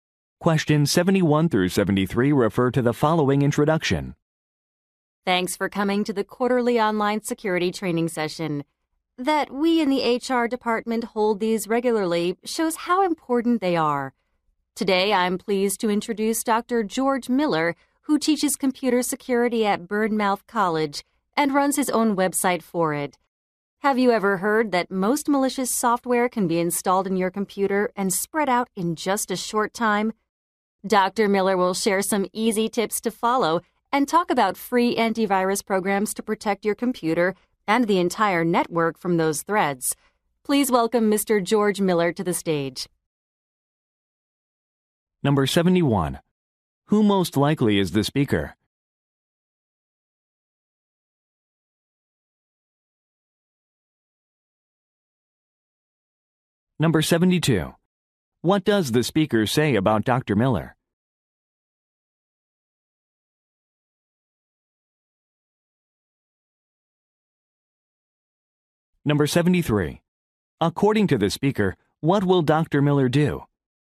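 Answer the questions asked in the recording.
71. An HR department employee
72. He teaches computer security at Bournemouth College and runs his own website
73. Share easy tips and talk about free antivirus programs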